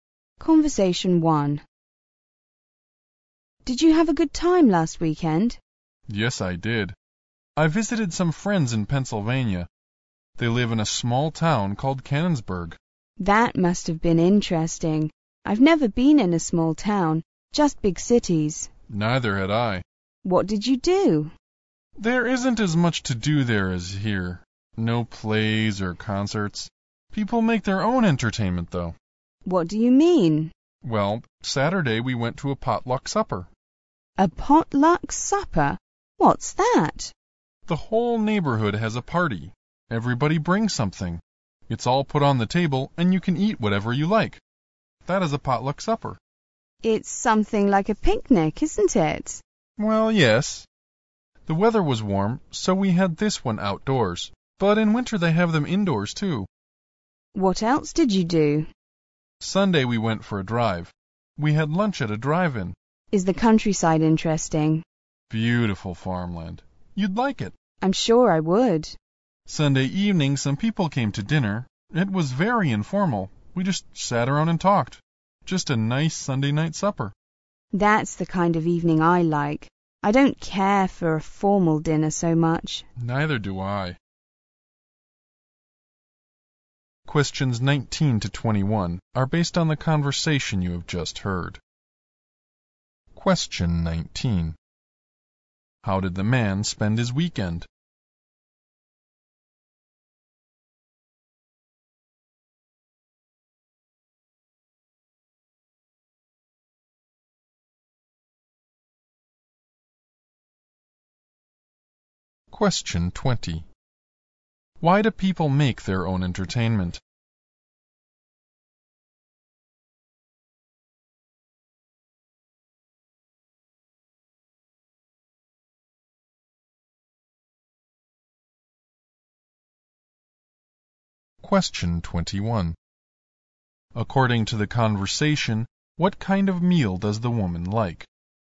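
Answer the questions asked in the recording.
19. Visiting friends in a small town in Pennsylvania.
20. There isn't much to do there, no plays or concerts.
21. An informal one.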